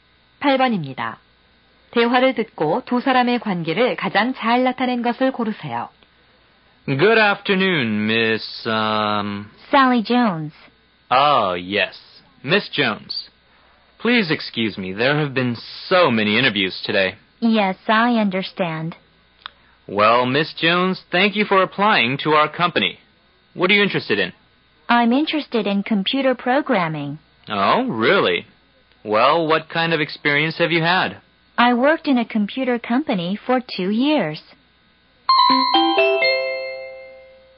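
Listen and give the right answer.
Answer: 면접관과 구직자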